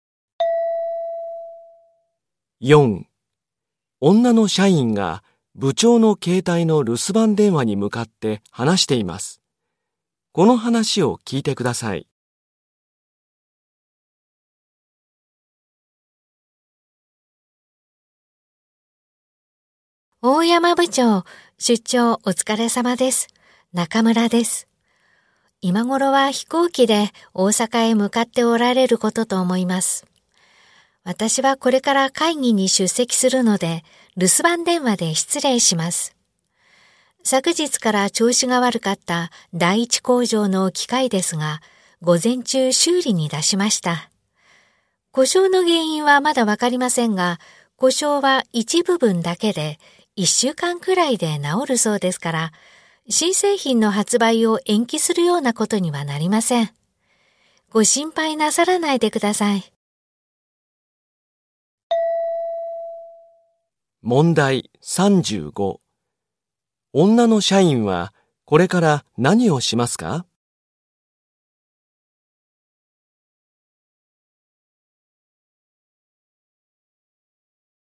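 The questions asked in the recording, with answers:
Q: 女の社員はこれから何をしますか?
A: 会議に出席する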